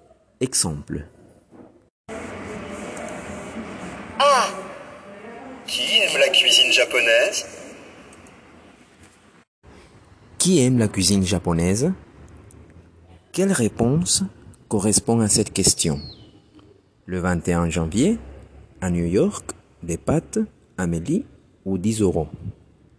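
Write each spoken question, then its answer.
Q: Quelle réponse correspond à cette question?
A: Amélie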